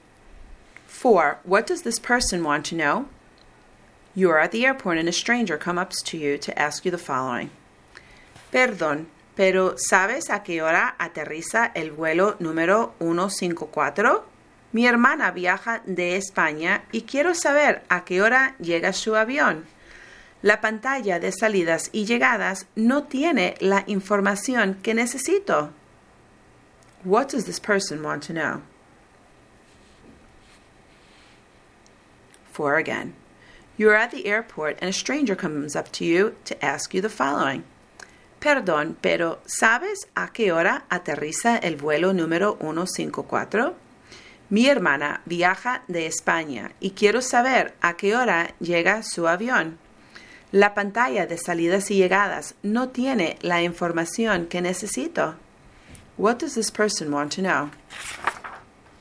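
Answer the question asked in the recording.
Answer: What time flight 154 lands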